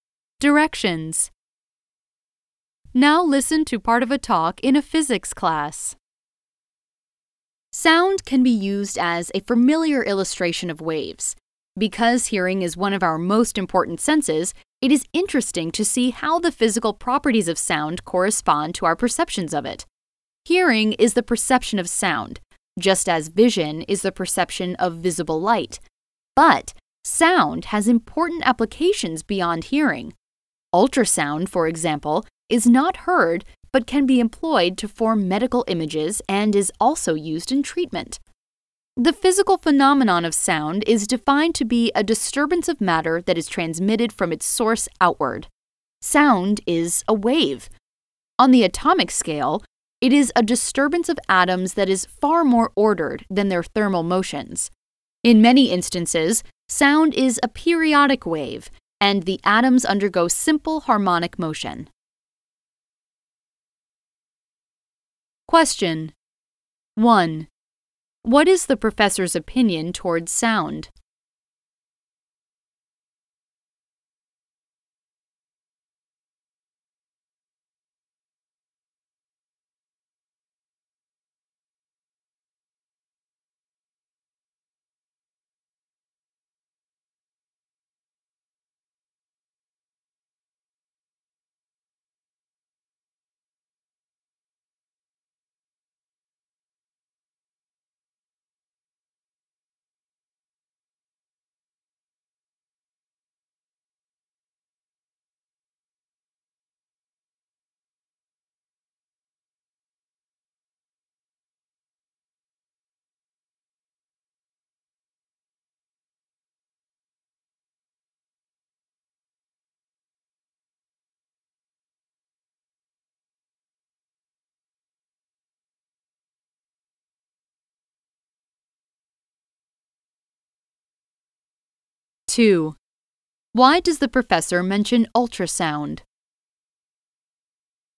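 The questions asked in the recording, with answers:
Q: Why does the professor mention ultrasound?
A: To show that sound has important uses beyond hearing, such as medical imaging and treatment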